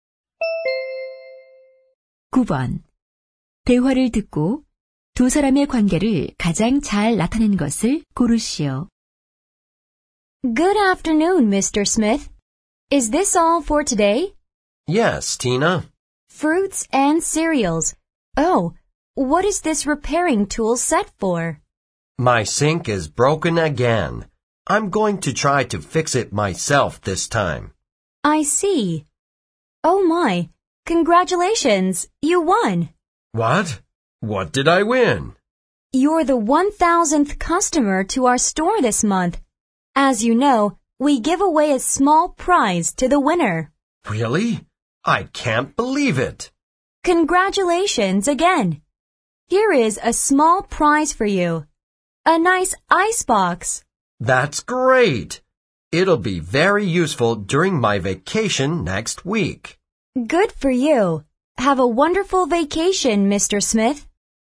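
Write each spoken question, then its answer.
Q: 대화를 듣고 두 사람의 관계를 가장 잘 나타낸 것을 고르시오.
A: 상점 점원 - 손님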